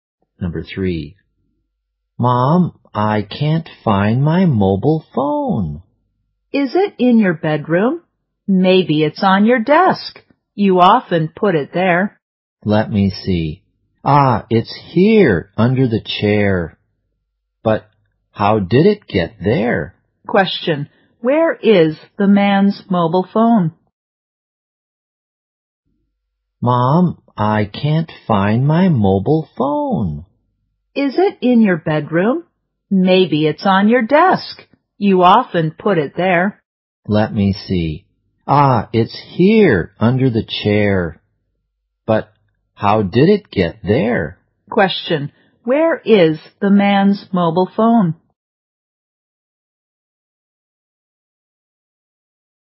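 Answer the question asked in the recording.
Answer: Under the chair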